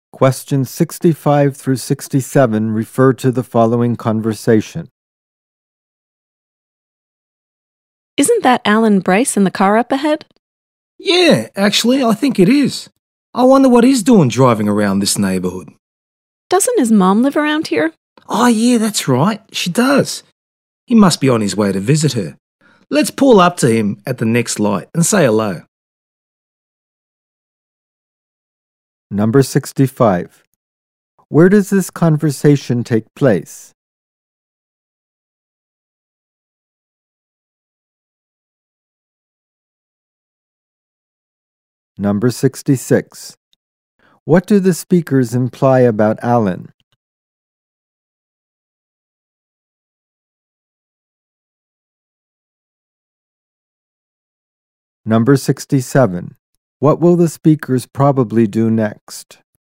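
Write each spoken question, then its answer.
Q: Where does this conversation take place?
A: In a car

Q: What do the speakers imply about Alan?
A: He is going to visit his mother

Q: What will the speakers probably do next?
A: Pull up to Alan at the next light and say hello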